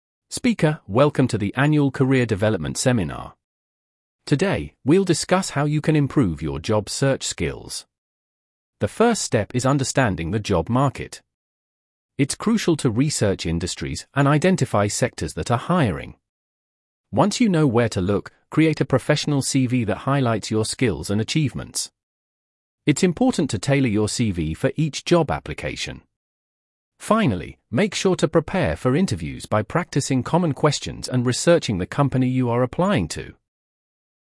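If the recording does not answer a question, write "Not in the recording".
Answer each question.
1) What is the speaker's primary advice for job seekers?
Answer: Research the job market, tailor your CV for each application and prepare for interviews

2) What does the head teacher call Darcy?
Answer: Not in the recording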